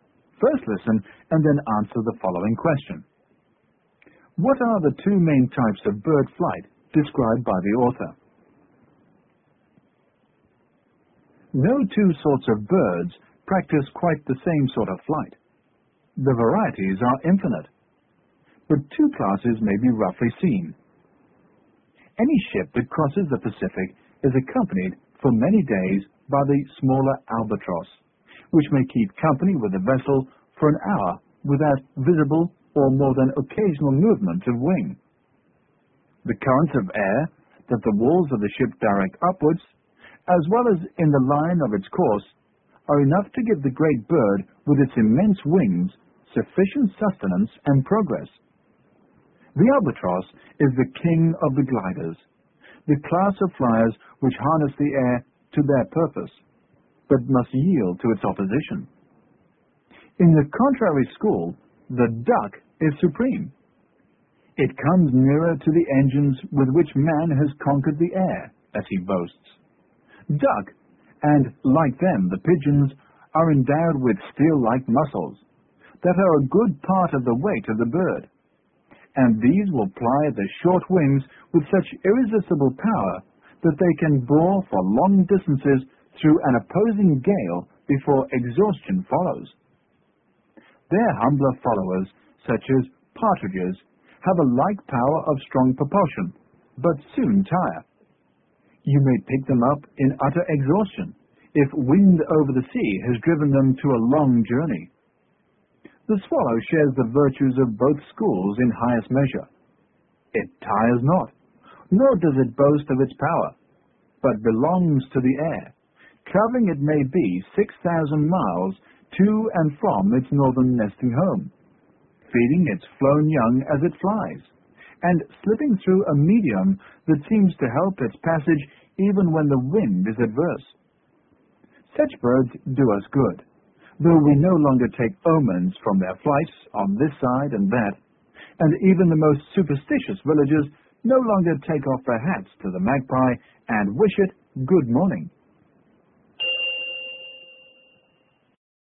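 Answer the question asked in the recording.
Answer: Gliding (like the albatross, using air currents) and powered flapping flight (like the duck, using strong wing muscles)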